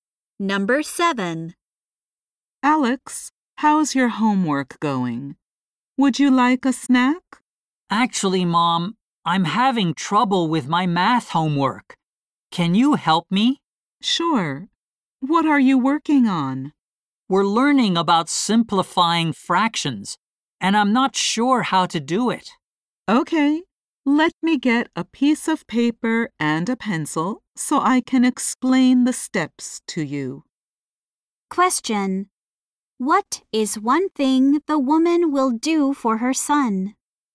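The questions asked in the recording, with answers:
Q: What is one thing the woman will do for her son?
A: Explain the steps of his math homework.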